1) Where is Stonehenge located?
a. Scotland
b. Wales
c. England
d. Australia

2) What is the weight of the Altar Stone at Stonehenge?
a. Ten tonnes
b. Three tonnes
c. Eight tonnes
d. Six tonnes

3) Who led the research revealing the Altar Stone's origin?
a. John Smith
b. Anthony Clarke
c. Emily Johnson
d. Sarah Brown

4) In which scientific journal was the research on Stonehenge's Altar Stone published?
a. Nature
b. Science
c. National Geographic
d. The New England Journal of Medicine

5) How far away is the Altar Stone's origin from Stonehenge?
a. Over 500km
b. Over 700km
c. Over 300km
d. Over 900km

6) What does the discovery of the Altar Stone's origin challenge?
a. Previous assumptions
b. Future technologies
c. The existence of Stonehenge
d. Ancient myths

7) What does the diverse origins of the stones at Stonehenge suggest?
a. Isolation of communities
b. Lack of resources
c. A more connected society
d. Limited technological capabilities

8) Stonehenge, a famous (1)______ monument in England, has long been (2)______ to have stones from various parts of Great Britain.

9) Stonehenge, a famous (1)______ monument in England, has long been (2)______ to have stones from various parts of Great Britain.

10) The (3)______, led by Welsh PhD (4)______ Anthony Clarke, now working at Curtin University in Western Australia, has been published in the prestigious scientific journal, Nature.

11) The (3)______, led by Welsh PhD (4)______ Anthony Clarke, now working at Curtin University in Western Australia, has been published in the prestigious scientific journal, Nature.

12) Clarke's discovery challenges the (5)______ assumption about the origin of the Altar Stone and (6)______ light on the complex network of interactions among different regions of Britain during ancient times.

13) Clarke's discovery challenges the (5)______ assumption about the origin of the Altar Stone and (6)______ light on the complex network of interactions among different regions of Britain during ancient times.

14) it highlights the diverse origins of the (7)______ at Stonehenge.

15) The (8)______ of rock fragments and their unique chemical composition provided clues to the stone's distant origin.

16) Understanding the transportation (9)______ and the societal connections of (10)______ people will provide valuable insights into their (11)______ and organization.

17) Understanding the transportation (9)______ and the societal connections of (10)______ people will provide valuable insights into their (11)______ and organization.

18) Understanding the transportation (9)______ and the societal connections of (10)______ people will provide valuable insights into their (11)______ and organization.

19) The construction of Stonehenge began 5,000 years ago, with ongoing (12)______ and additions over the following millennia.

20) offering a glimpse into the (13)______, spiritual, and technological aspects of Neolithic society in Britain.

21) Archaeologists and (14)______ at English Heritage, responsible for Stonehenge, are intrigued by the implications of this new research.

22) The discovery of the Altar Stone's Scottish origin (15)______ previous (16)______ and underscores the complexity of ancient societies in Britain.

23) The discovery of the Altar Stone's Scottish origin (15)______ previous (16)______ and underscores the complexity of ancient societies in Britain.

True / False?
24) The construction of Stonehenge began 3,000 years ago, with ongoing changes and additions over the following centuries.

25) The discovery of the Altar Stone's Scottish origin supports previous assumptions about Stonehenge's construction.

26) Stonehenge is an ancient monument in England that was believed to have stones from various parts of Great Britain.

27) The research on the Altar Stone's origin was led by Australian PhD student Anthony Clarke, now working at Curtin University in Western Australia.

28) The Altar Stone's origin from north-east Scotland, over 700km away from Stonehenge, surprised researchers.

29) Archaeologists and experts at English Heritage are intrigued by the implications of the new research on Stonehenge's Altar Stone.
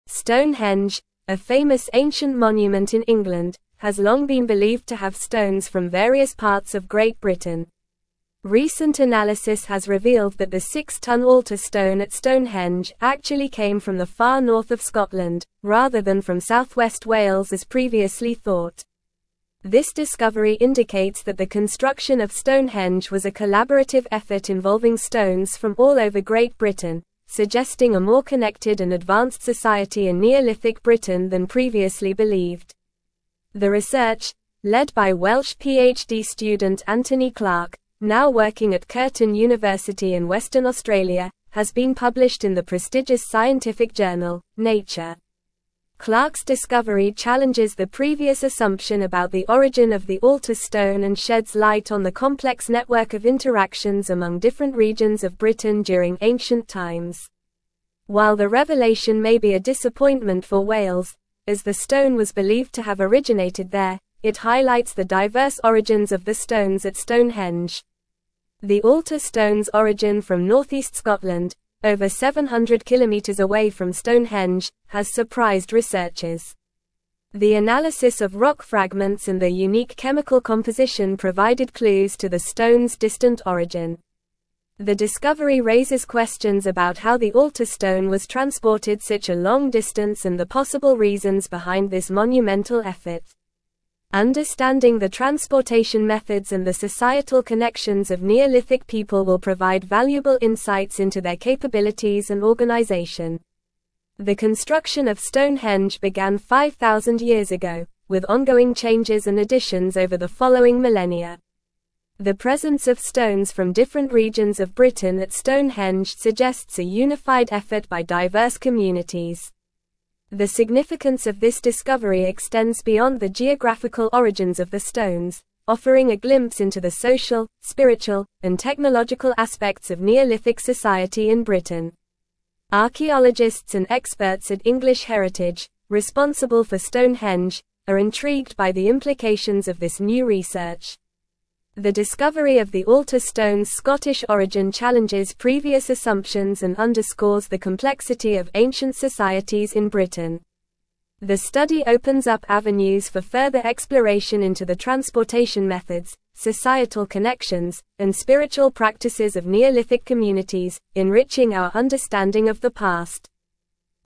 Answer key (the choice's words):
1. England
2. Six tonnes
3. Anthony Clarke
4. Nature
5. Over 700km
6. Previous assumptions
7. A more connected society
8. ancient
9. believed
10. research
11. student
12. previous
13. sheds
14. stones
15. analysis
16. methods
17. Neolithic
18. capabilities
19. changes
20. social
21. experts
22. challenges
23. assumptions
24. False
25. False
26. True
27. False
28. True
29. True

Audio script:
Stonehenge, a famous ancient monument in England, has long been believed to have stones from various parts of Great Britain. Recent analysis has revealed that the six-tonne Altar Stone at Stonehenge actually came from the far north of Scotland, rather than from south-west Wales as previously thought. This discovery indicates that the construction of Stonehenge was a collaborative effort involving stones from all over Great Britain, suggesting a more connected and advanced society in Neolithic Britain than previously believed.
The research, led by Welsh PhD student Anthony Clarke, now working at Curtin University in Western Australia, has been published in the prestigious scientific journal, Nature. Clarke's discovery challenges the previous assumption about the origin of the Altar Stone and sheds light on the complex network of interactions among different regions of Britain during ancient times. While the revelation may be a disappointment for Wales, as the stone was believed to have originated there, it highlights the diverse origins of the stones at Stonehenge.
The Altar Stone's origin from north-east Scotland, over 700km away from Stonehenge, has surprised researchers. The analysis of rock fragments and their unique chemical composition provided clues to the stone's distant origin. The discovery raises questions about how the Altar Stone was transported such a long distance and the possible reasons behind this monumental effort. Understanding the transportation methods and the societal connections of Neolithic people will provide valuable insights into their capabilities and organization.
The construction of Stonehenge began 5,000 years ago, with ongoing changes and additions over the following millennia. The presence of stones from different regions of Britain at Stonehenge suggests a unified effort by diverse communities. The significance of this discovery extends beyond the geographical origins of the stones, offering a glimpse into the social, spiritual, and technological aspects of Neolithic society in Britain.
Archaeologists and experts at English Heritage, responsible for Stonehenge, are intrigued by the implications of this new research. The discovery of the Altar Stone's Scottish origin challenges previous assumptions and underscores the complexity of ancient societies in Britain. The study opens up avenues for further exploration into the transportation methods, societal connections, and spiritual practices of Neolithic communities, enriching our understanding of the past.

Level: Level 4